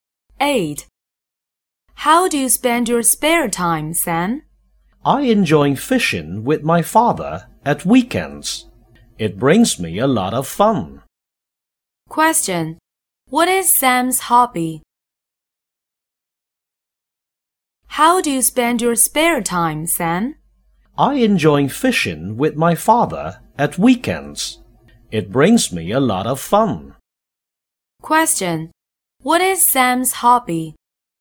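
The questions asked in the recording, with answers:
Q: What is Sam's hobby?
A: Fishing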